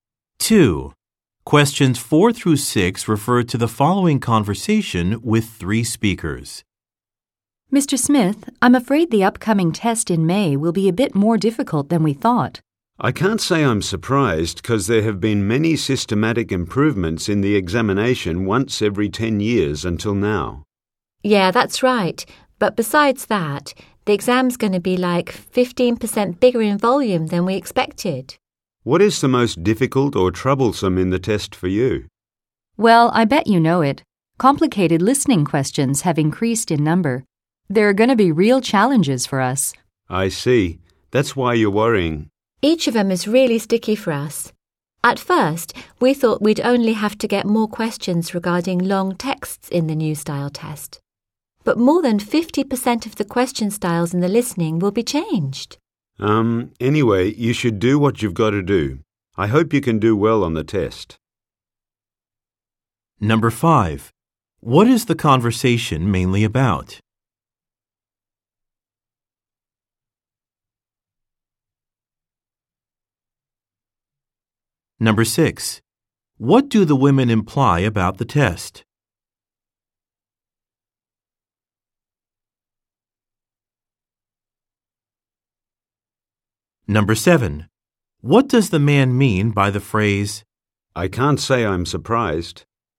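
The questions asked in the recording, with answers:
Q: What is the conversation mainly about?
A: The upcoming test in May being more difficult than expected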